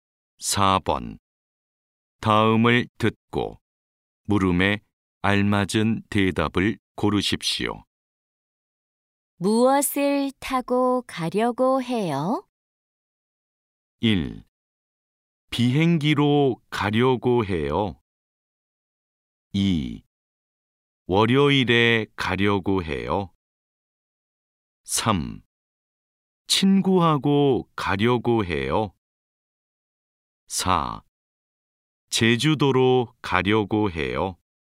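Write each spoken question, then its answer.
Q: 무엇을 타고 가려고 해요?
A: 1: 비행기로 가려고 해요.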